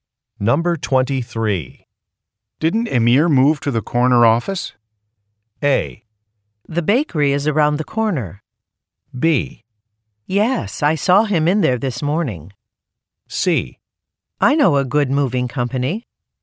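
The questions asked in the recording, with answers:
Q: Didn't Emir move to the corner office?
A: B: Yes, I saw him in there this morning.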